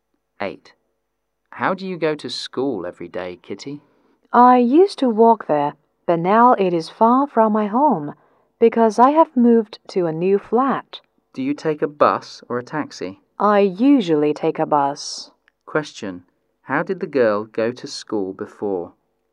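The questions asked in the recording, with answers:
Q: How did the girl go to school before?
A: She walked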